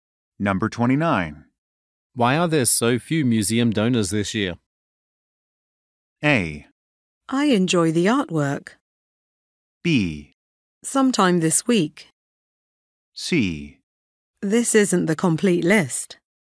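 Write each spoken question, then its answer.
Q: Why are there so few museum donors this year?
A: C: This isn't the complete list.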